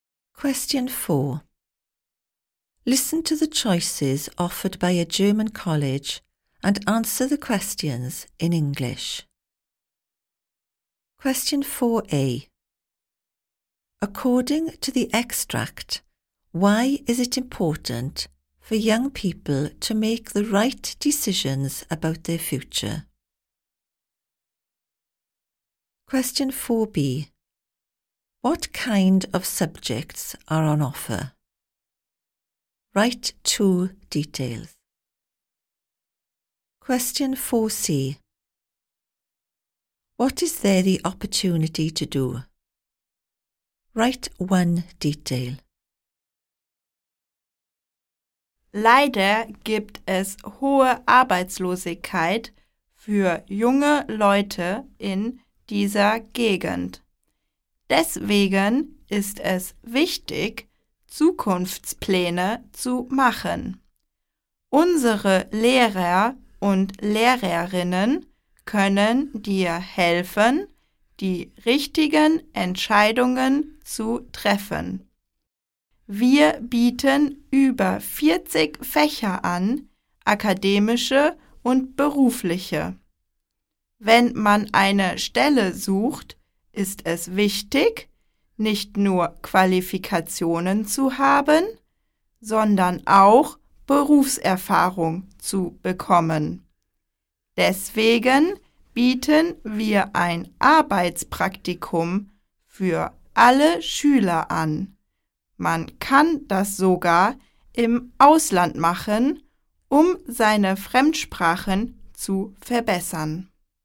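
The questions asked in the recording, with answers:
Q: According to the extract, why is it important for young people to make the right decisions about their future?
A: There is high youth unemployment in the area

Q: What kind of subjects are on offer?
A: Academic and vocational (over 40 subjects)

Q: What is there the opportunity to do?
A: Work experience, even abroad to improve foreign languages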